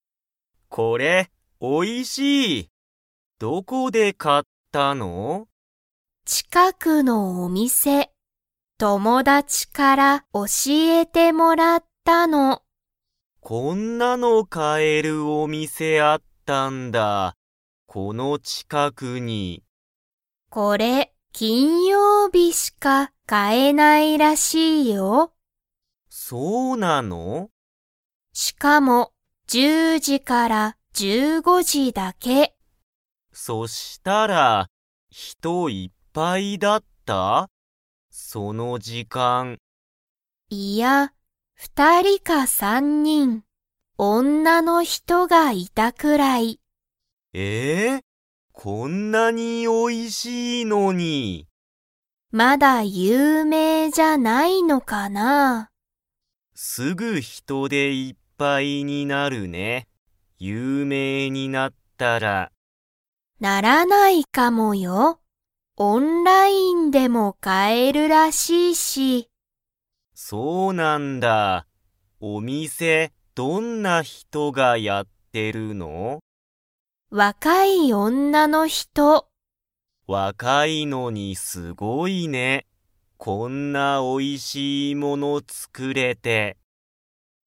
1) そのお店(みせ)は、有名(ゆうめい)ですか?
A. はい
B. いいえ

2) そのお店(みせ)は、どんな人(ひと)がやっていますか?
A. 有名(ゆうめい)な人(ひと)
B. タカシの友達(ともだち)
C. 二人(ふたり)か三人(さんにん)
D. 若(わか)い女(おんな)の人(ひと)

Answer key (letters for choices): 1B, 2D

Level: Level 2